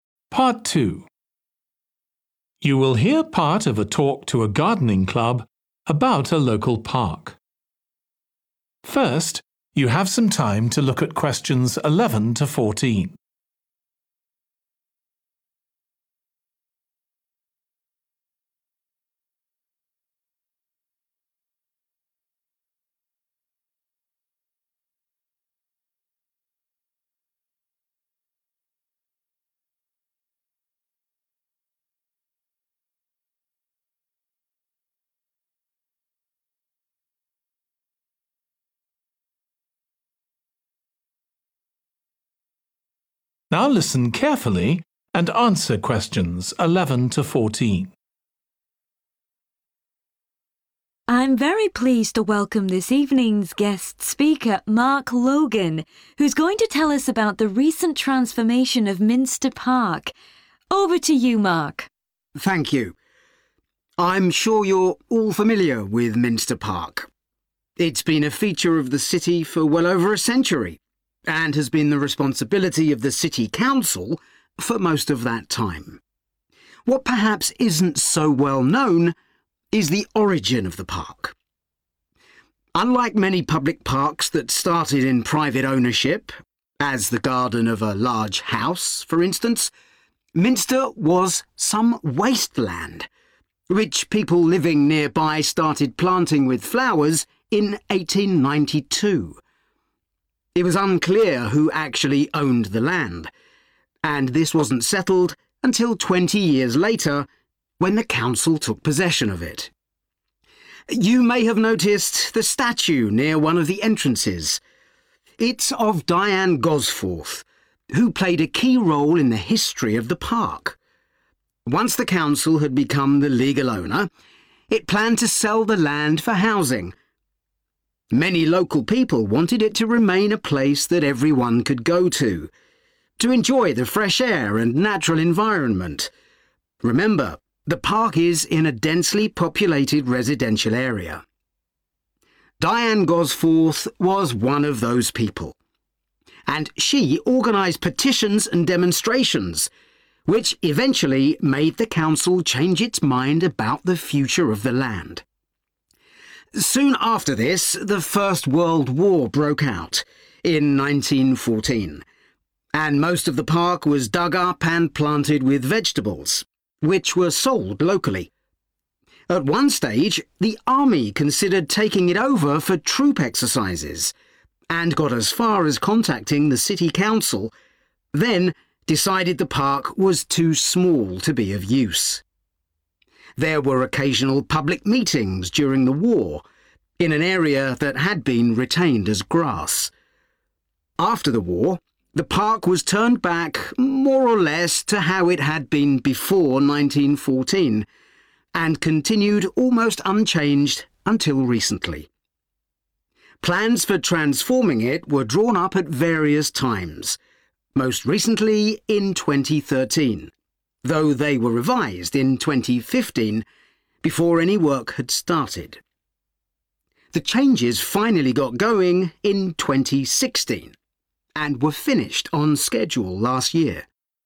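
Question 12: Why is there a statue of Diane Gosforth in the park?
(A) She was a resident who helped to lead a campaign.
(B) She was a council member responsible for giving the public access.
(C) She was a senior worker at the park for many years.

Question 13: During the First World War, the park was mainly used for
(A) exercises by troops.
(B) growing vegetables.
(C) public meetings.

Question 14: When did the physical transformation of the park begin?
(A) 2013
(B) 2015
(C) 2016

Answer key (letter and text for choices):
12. (A) She was a resident who helped to lead a campaign.
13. (B) growing vegetables.
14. (C) 2016

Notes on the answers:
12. Many local people wanted it to remain a place that everyone could go to, to enjoy the fresh air and natural environment – remember the park is in a densely populated residential area. Diane Gosforth was one of those people, and she organized petitions and demonstrations, which eventually made the council change its mind about the future of the land. 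(Diane Gosforth là một trong số đó, và bà ấy đã đưa ra những kiến nghị cùng những cuộc biểu tình, thứ làm hội đồng phải thay đổi suy nghĩ về tương lai của mảnh đất)
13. Soon after this the First World War broke out, in 1914, and most of the park was dug up and planted with vegetables (công viên gần như được đào xới hết lên và trồng rau lên đó), which were sold locally.
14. Xuất hiện các mốc thời gian, từ những dự định "thay áo mới" cho công viên đến quá trình xem xét sửa đổi kế hoạch, cuối cùng là đi vào thực thi. "Plans for transforming it were drawn up at various times, most recently in 2013, though they were revised in 2015, before any work had started. The changes finally got going in 2016 (Những thay đổi bắt đầu đi vào thực thi năm 2016), and were finished on schedule last year."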